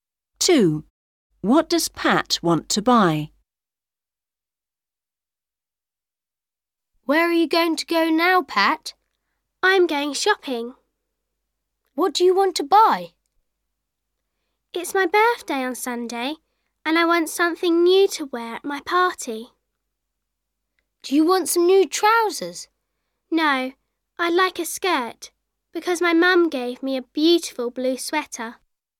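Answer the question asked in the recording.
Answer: a skirt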